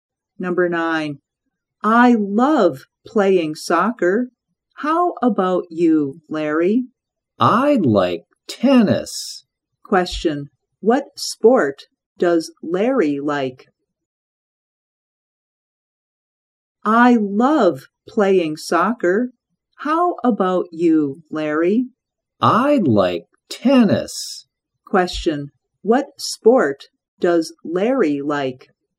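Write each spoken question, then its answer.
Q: what sport does Larry like?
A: Tennis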